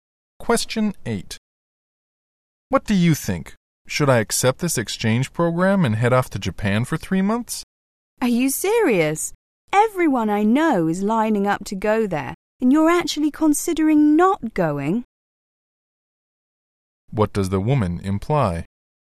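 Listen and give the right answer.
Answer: The man should definitely go to Japan.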